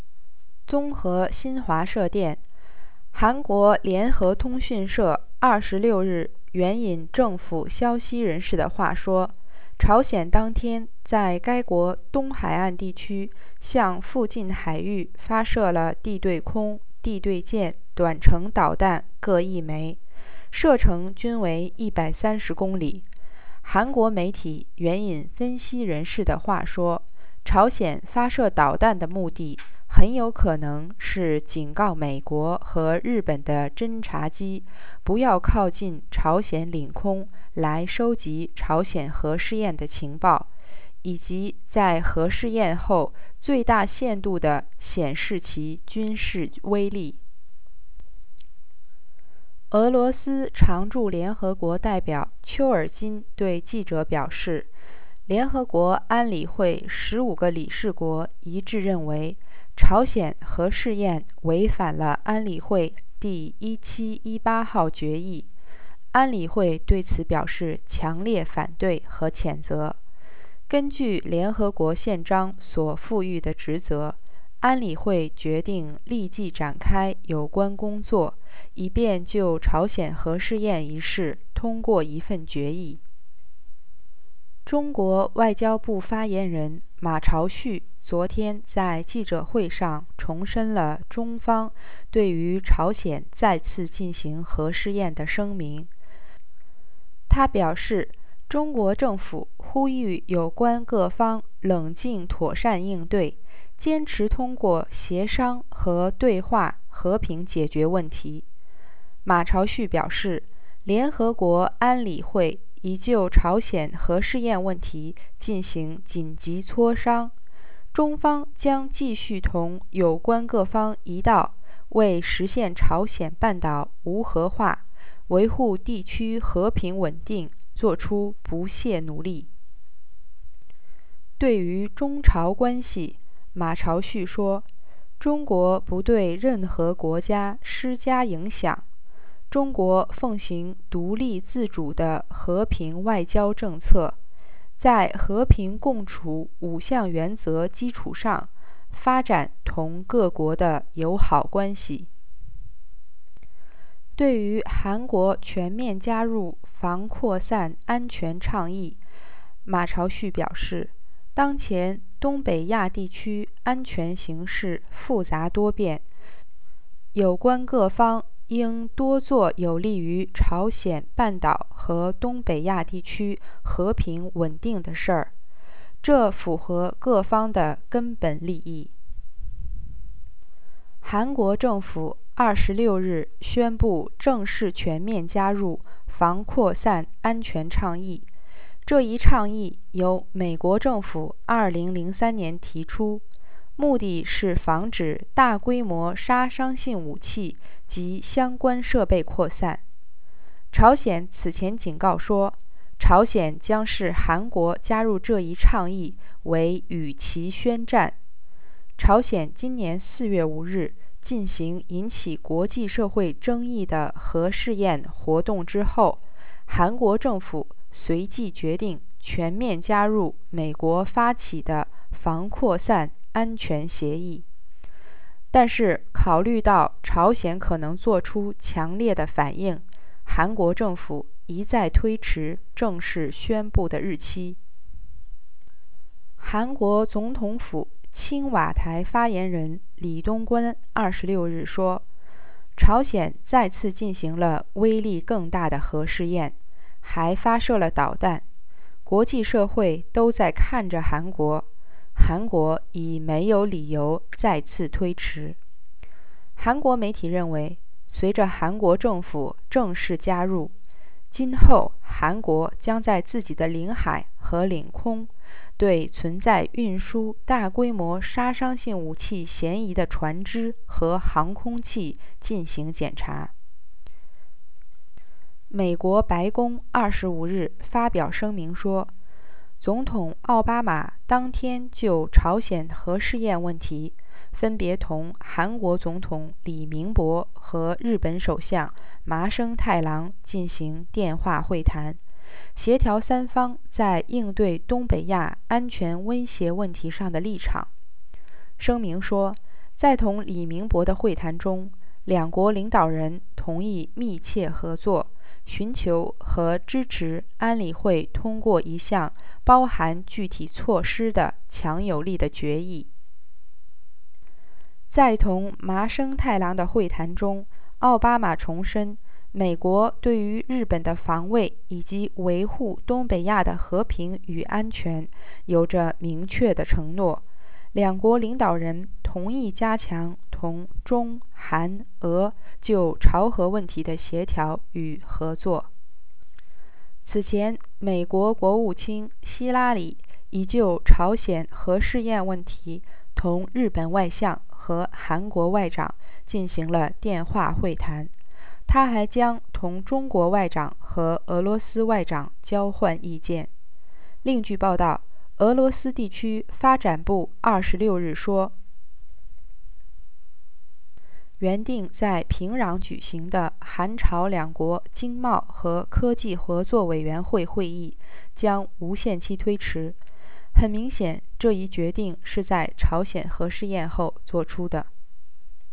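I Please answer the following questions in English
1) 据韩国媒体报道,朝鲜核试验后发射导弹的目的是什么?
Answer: To warn US and Japanese reconnaissance planes not to approach North Korean airspace to gather intelligence on the nuclear test, and to show its military power to the fullest after the test.

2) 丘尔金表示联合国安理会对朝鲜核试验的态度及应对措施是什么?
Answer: All 15 members agreed the test violated Resolution 1718 and strongly opposed and condemned it; the Council would start work at once to pass a resolution.

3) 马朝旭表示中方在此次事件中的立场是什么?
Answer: China called on all parties to respond calmly and properly and to solve the issue peacefully through consultation and dialogue, and it will keep working with the others for a nuclear-free peninsula and regional peace and stability.

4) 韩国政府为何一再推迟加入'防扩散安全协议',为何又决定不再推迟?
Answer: It delayed because North Korea might react strongly. It stopped delaying because North Korea had carried out a more powerful nuclear test and fired missiles, and the world was watching South Korea.

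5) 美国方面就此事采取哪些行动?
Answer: Obama phoned Lee Myung-bak and Taro Aso to coordinate positions and agreed to seek a strong UN Security Council resolution. Clinton phoned the Japanese and South Korean foreign ministers and will also talk with the Chinese and Russian ones.

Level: 3rd Year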